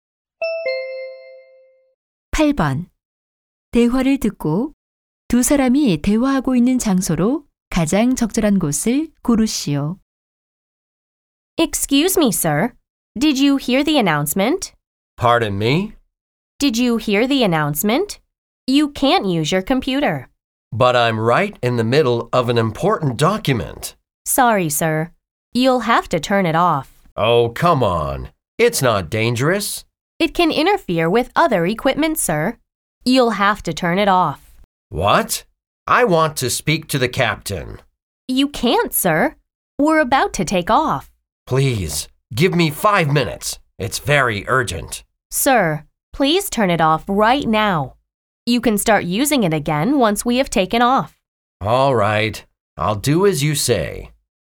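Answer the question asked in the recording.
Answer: 비행기 안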